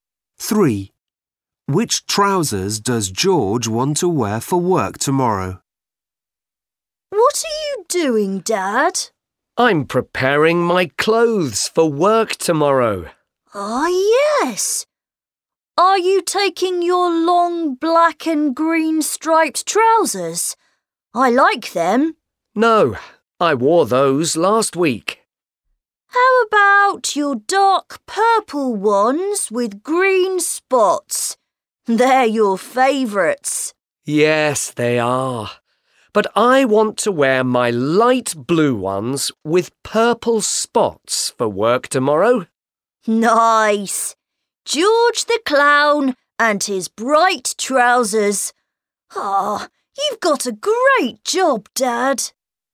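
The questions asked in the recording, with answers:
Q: Which trousers does George want to wear for work tomorrow?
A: light blue ones with purple spots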